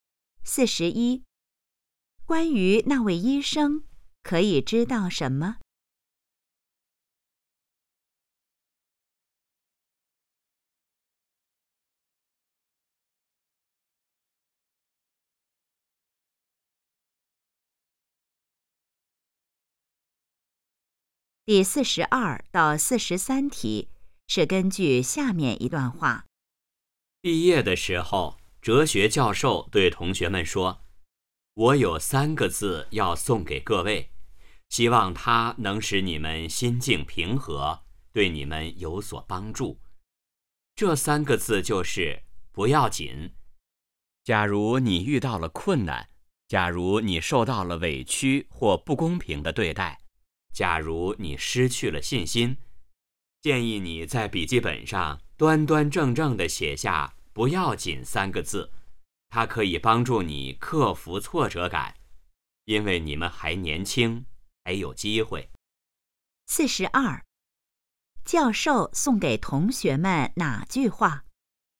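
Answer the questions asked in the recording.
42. 不要紧
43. 帮助克服挫折感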